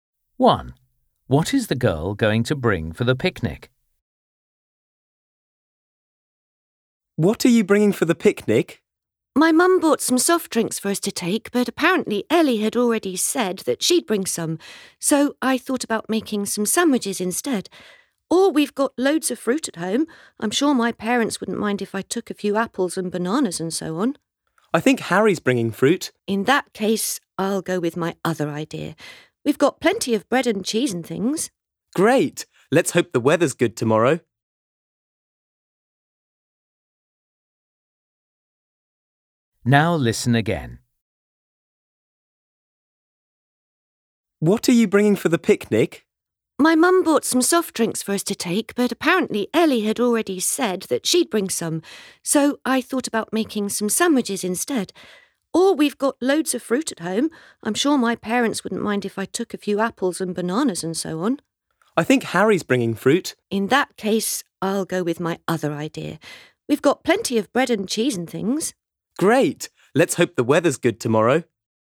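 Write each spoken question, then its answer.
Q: What is the girl going to bring for the picnic?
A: sandwiches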